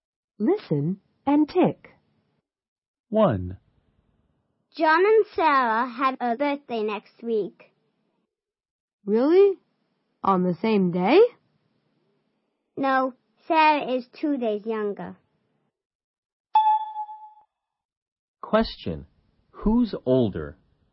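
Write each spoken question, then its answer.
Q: Who's older?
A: John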